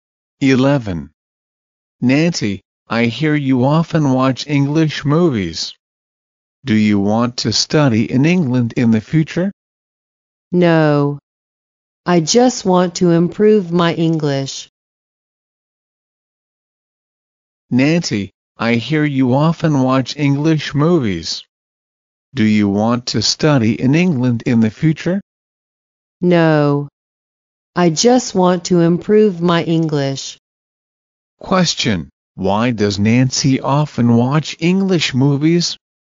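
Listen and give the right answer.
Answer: To improve her English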